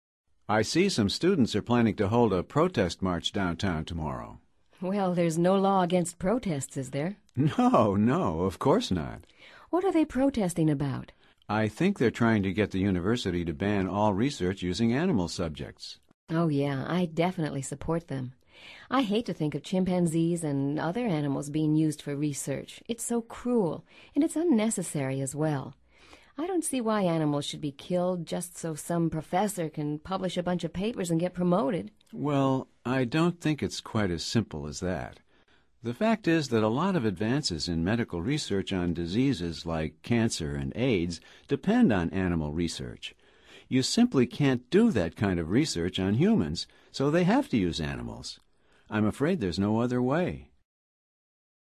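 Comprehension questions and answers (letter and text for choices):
Activity 99: Basándote en los comentarios anteriores, selecciona las opciones más adecuadas. Recuerda lo siguiente: opinions for = opiniones a favor; opinions against = opiniones en contra. Verifica luego las respuestas correctas.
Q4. What is the main issue in dialogue #2?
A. A law against students' protests.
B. Holding a protest march today.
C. Banning all research using animals.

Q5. What are the opinions for this issue?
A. Animals should be killed for research.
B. Killing animals is cruel and unnecessary.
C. Chimpanzees are unnecessary.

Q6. What are the opinions against this issue?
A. Animals are useful for medical advances.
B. Scientists don't have to use animals.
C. Research could be done on humans.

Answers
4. C. Banning all research using animals.
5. B. Killing animals is cruel and unnecessary.
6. A. Animals are useful for medical advances.

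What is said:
I see some students are planning to hold a protest march downtown tomorrow.
Well, there's no law against protests, is there?
No, no, of course not.
What are they protesting about?
I think they're trying to get the university to ban all research using animal subjects.
Oh, yeah. I definitely support them. I hate to think of chimpanzees and other animals being used for research. It's so cruel, and it's unnecessary as well. I don't see why animals should be killed just so some professor can publish a bunch of papers and get promoted.
Well, I don't think it's quite as simple as that. The fact is that a lot of advances in medical research on diseases like cancer and AIDS depend on animal research. You simply can't do that kind of research on humans, so they have to use animals. I'm afraid there's no other way.

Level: Nivel Avanzado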